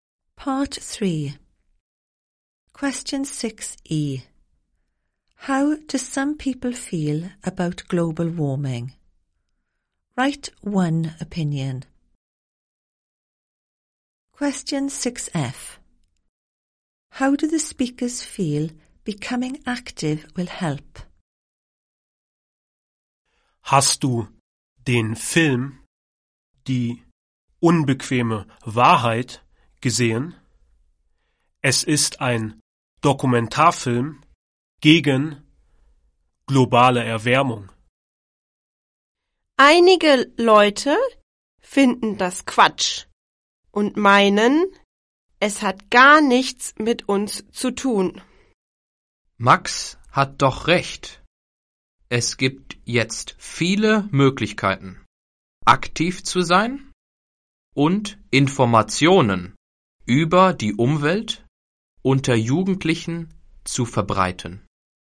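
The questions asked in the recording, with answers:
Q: How do some people feel about global warming?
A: It's nonsense and has nothing to do with us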